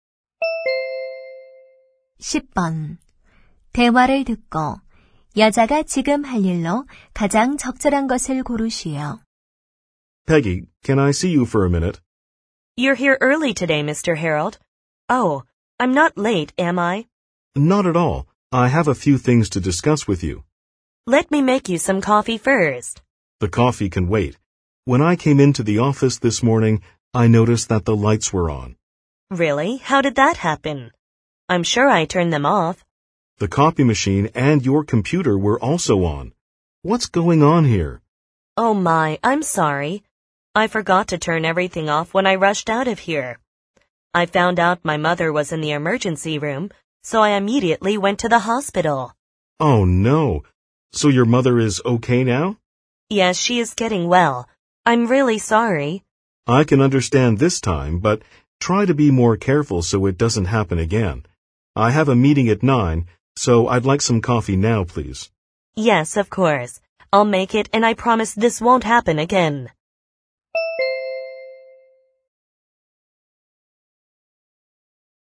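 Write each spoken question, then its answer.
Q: 대화를 듣고 여자가 지금 할 일로 가장 적절한 것을 고르시오.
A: 커피 만들기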